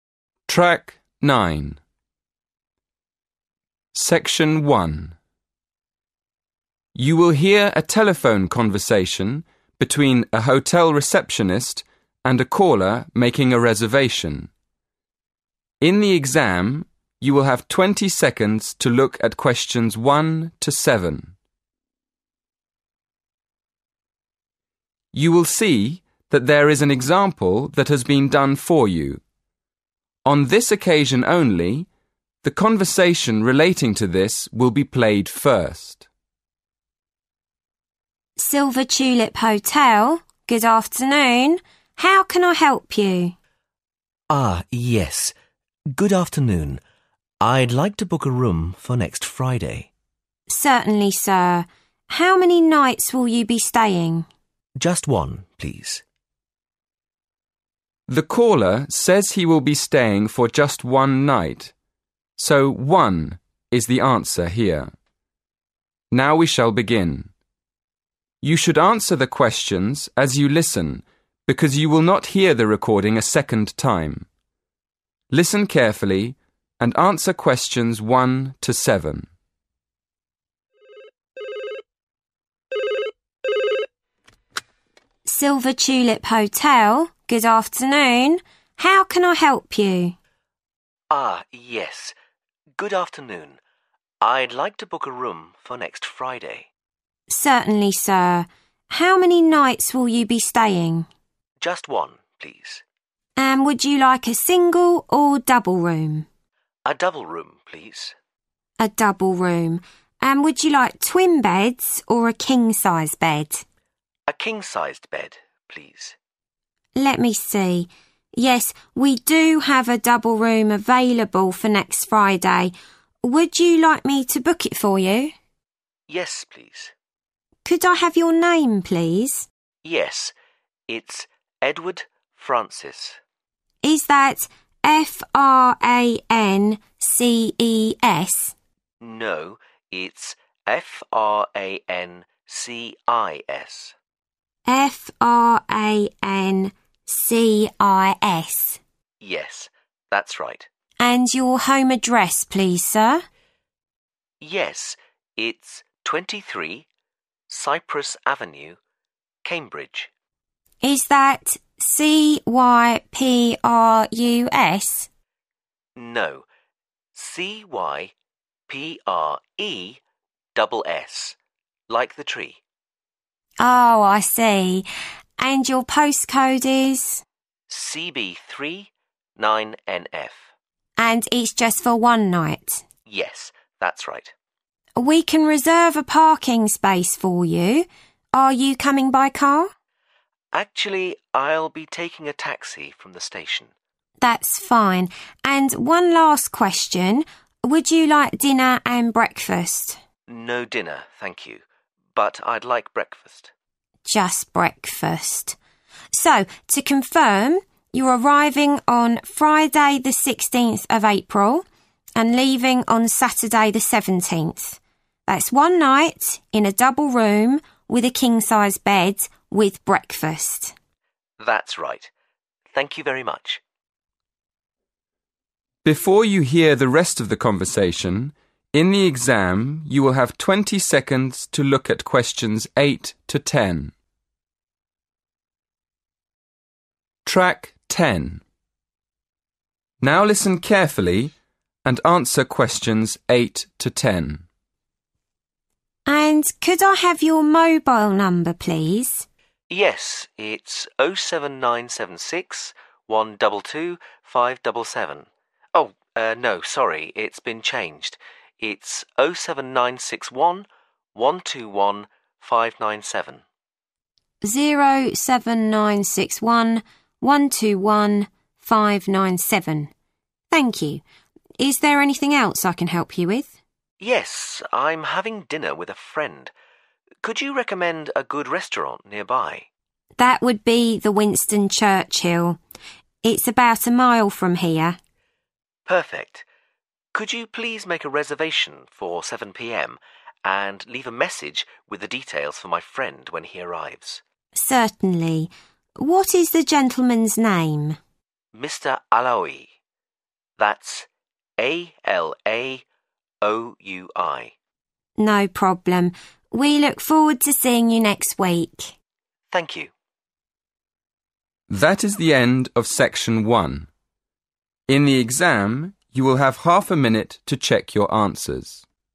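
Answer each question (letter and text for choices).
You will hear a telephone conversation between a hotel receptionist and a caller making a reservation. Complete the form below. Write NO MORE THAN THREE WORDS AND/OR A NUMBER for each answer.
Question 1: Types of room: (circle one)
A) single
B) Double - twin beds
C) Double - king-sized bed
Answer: C) Double - king-sized bed

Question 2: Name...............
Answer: Edward Francis

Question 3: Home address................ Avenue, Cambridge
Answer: 23 Cypress

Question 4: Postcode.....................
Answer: CB3 9NF

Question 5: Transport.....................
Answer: taxi

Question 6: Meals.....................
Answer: breakfast

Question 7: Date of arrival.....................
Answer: 16th April

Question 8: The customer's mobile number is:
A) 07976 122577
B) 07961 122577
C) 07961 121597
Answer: C) 07961 121597

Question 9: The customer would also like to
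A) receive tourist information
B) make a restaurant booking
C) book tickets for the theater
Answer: B) make a restaurant booking

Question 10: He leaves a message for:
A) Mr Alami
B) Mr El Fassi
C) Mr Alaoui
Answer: C) Mr Alaoui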